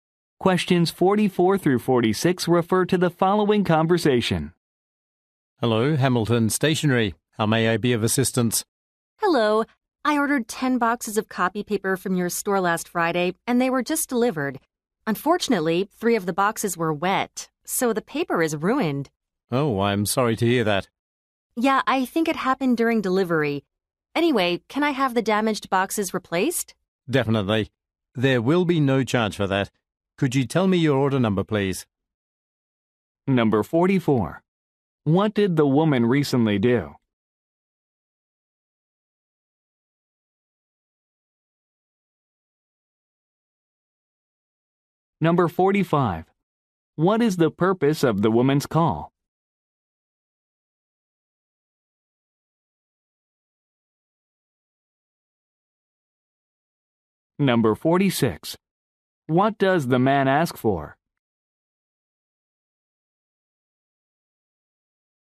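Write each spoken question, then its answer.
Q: What did the woman recently do?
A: Ordered ten boxes of copy paper

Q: What is the purpose of the woman's call?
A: To get damaged boxes replaced

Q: What does the man ask for?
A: Her order number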